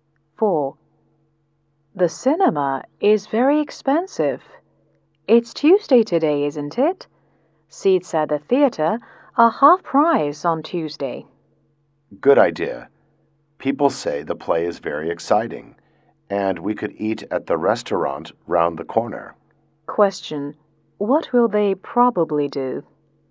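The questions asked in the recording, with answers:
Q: What will they probably do?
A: Go to the theater to see the play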